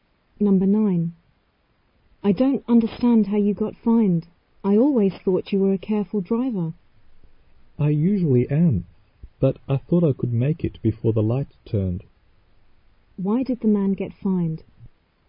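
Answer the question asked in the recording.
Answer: He drove through a red light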